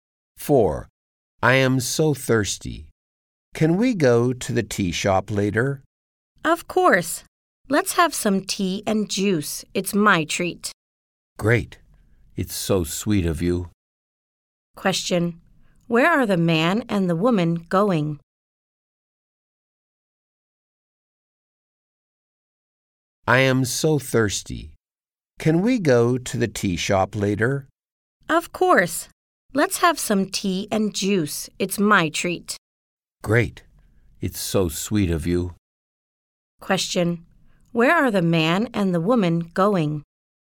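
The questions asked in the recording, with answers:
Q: Question. Where are the man and the woman going?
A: To the tea shop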